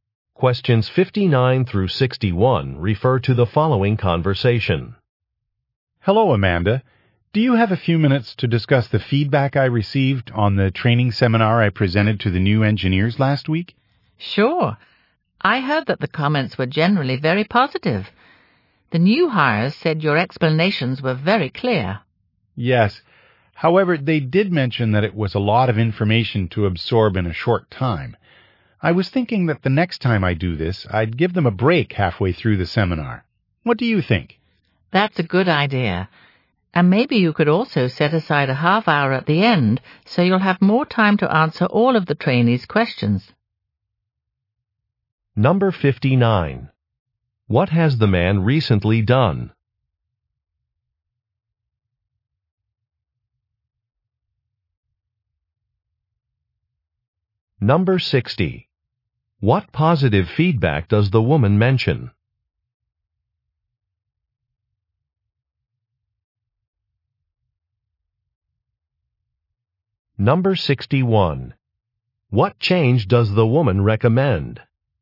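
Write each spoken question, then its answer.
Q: What has the man recently done?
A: Given a training seminar for new engineers

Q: What positive feedback does the woman mention?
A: His explanations were very clear

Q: What change does the woman recommend?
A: Setting aside time at the end for questions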